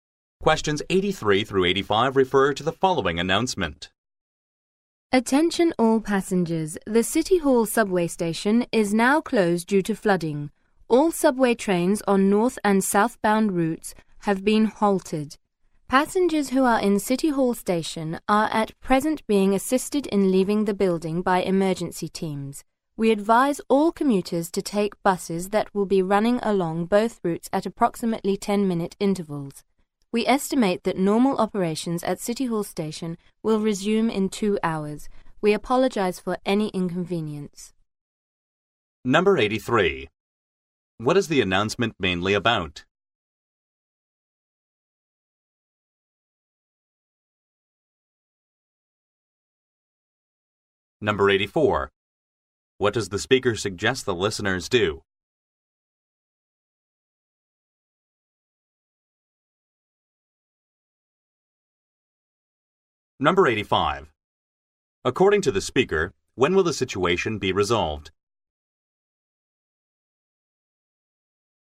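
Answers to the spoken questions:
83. City Hall subway station closed due to flooding
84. Take buses
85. In 2 hours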